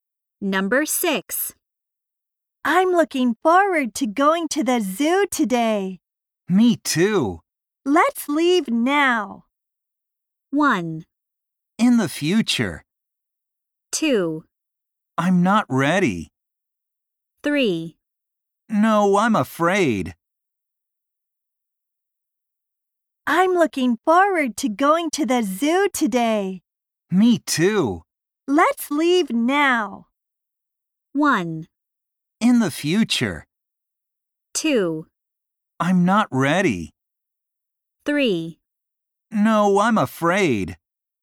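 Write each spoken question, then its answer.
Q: Let's leave now.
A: 2: I'm not ready.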